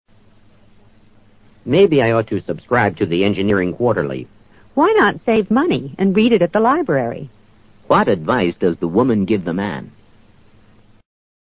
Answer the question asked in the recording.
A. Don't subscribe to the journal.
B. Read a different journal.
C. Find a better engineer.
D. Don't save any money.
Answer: A. Don't subscribe to the journal.

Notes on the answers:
她建议他省点钱(不必订该杂志),去图书馆看这本杂志。A是她建议的实质。subscribe to: 订阅。Engineering Quarterly: 工程季刊(杂志名称)。journal: 杂志。